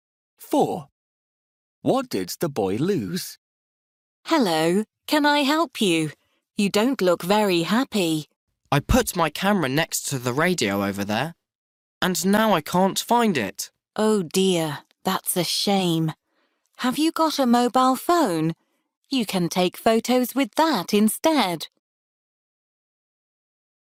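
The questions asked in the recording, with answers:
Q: What did the boy lose?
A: His camera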